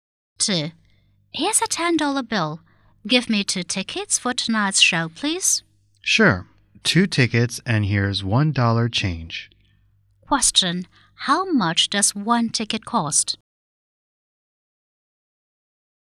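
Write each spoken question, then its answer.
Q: How much does 1 ticket cost?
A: $4.50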